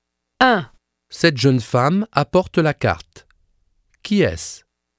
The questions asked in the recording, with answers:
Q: Qui est-ce?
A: C'est une serveuse.